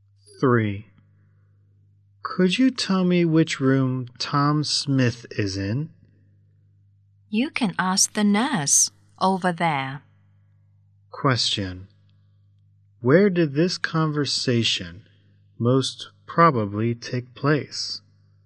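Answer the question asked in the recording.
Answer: In a hospital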